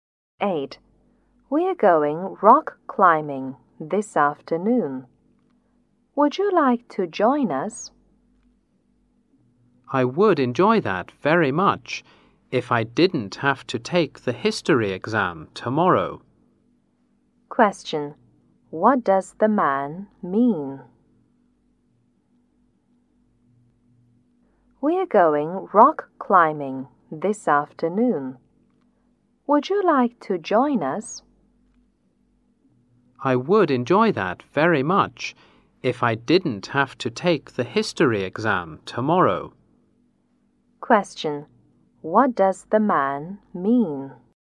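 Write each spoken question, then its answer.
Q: What does the man mean?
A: He can't go because he has a history exam tomorrow.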